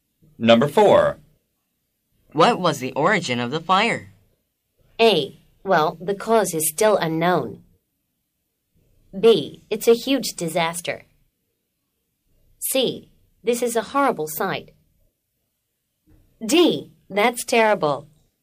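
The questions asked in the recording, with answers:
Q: What was the origin of the fire?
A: A: Well, the cause is still unknown.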